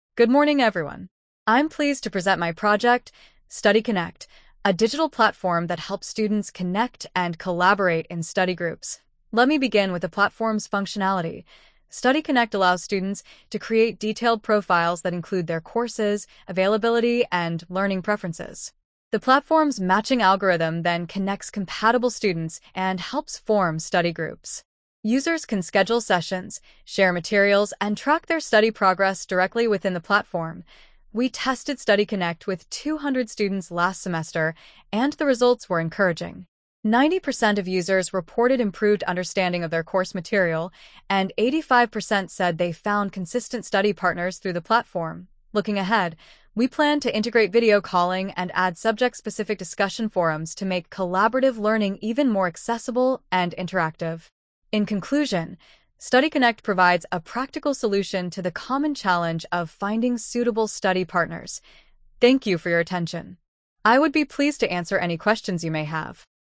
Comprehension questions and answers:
Complete the phrases as you listen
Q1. Let me begin with the platform's ______.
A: functionality

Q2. The matching ______ connects compatible students.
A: algorithm

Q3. Users can track ____ study progress within the platform.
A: their

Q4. We tested it ______ 200 students last semester.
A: with

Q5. 90% of users reported improved ______.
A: understanding

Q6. We plan to ______ video calling.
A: integrate

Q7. I'd be pleased to answer any ______.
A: questions

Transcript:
"Good morning everyone. I'm pleased to present my project, StudyConnect, a digital platform that helps students connect and collaborate in study groups.
Let me begin with the platform's functionality.
StudyConnect allows students to create detailed profiles that include their courses, availability, and learning preferences. The platform's matching algorithm then connects compatible students and helps form study groups. Users can schedule sessions, share materials, and track their study progress directly within the platform.
We tested StudyConnect with 200 students last semester, and the results were encouraging.
90% of users reported improved understanding of their course material, and 85% said they found consistent study partners through the platform.
Looking ahead, we plan to integrate video calling and add subject-specific discussion forums to make collaborative learning even more accessible and interactive.
In conclusion, StudyConnect provides a practical solution to the common challenge of finding suitable study partners.
Thank you for your attention. I would be pleased to answer any questions you may have."